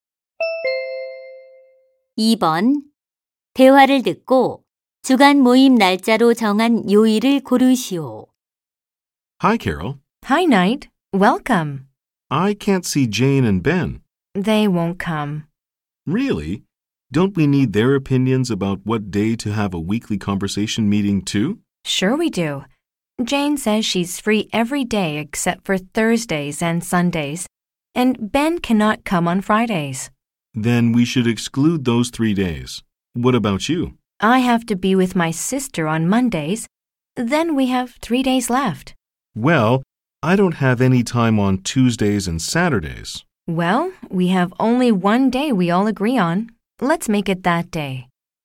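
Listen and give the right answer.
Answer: 수요일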